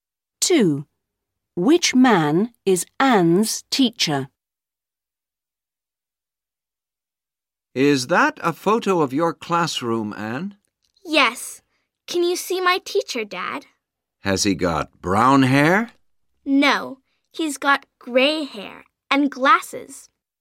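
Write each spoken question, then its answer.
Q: Which man is Anne's teacher?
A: the man with gray hair and glasses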